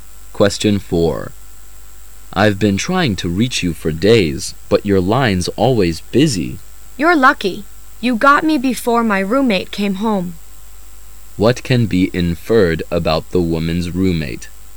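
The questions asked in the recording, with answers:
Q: What can be inferred about the woman's roommate?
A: She is on the phone a lot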